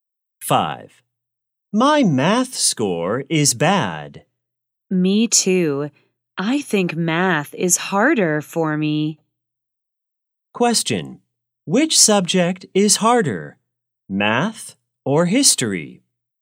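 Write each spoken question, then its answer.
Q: Which subject is harder, math or history?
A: Math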